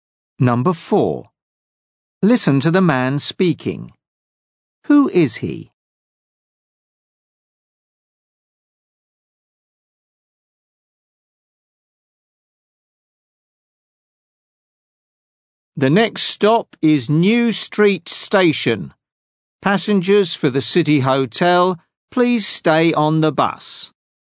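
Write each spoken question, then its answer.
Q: Who is he?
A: a bus driver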